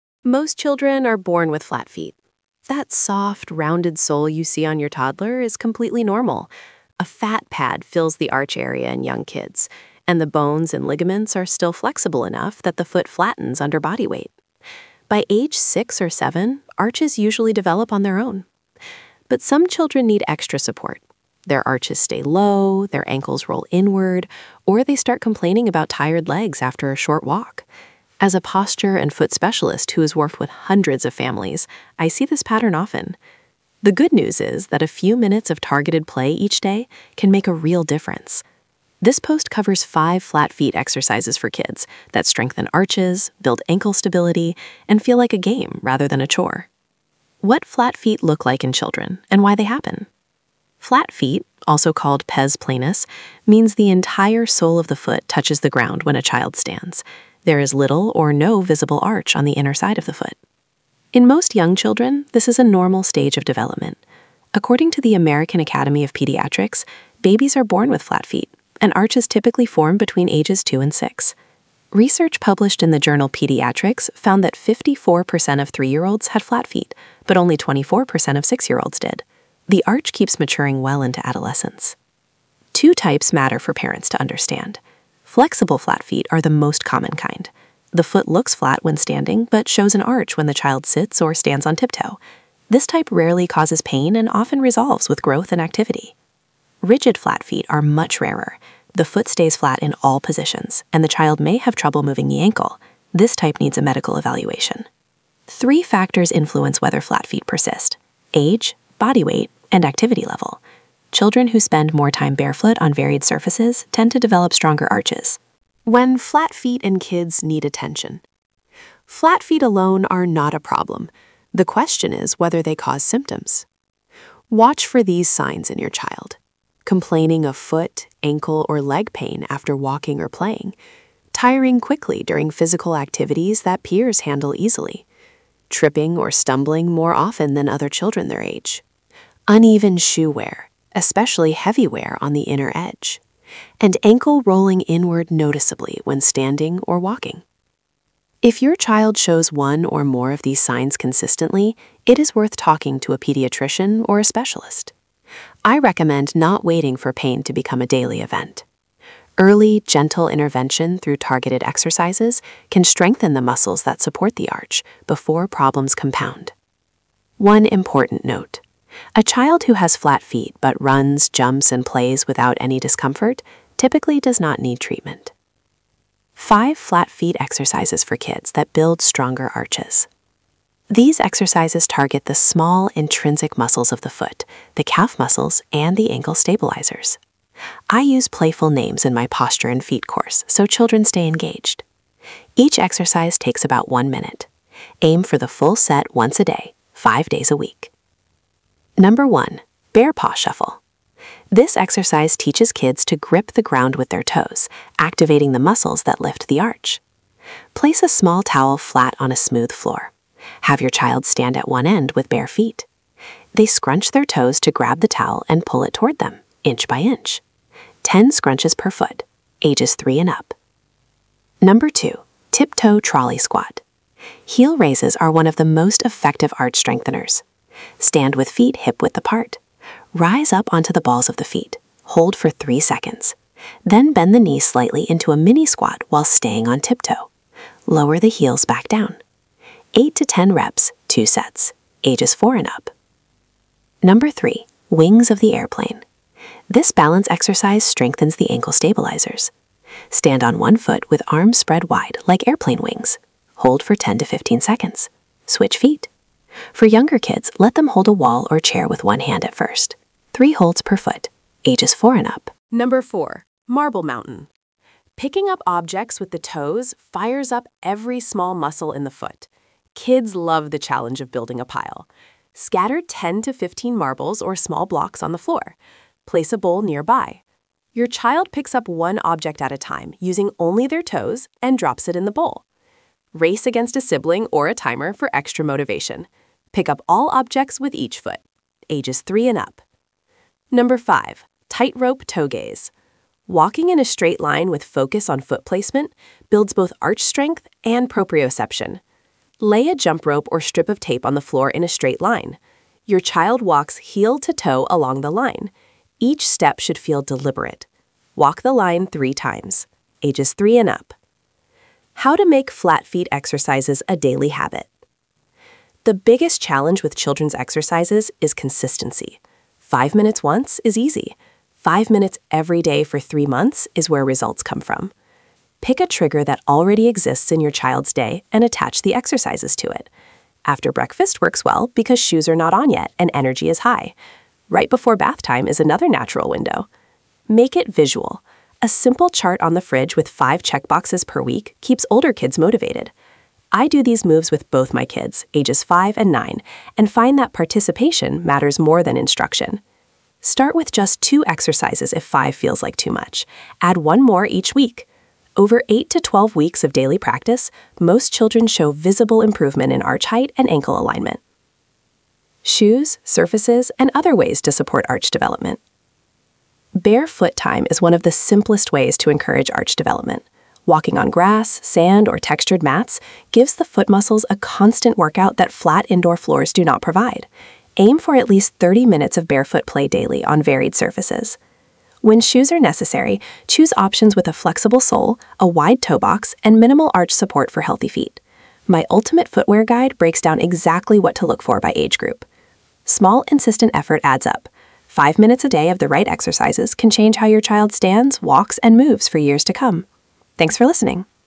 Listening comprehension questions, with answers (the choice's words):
Test your knowledge with these five quick questions. Answers are at the bottom.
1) At what age do most children's arches fully develop?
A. 2 years old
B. 6 to 7 years old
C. 12 years old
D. Arches are present from birth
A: 6 to 7 years old

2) Which type of flat feet is most common in children?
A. Rigid flat feet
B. Flexible flat feet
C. Structural flat feet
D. Permanent flat feet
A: Flexible flat feet

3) What percentage of 3-year-olds have flat feet?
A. About 10%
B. About 25%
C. About 54%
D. About 80%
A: About 54%

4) Which surface is best for building arch strength?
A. Flat tile floors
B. Thick-soled sneakers on pavement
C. Varied surfaces like grass, sand, and textured mats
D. Carpet only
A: Varied surfaces like grass, sand, and textured mats

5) How long should daily flat feet exercises take?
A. 30 minutes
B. 5 minutes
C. 1 hour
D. 15 minutes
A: 5 minutes